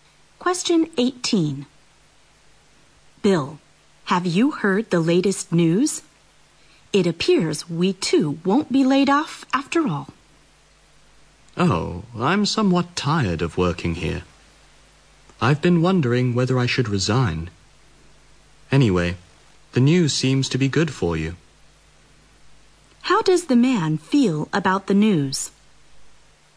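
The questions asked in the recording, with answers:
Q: How does the man feel about the news?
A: Indifferent; he is thinking of resigning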